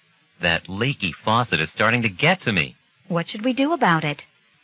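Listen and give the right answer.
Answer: What they should do about the leaky faucet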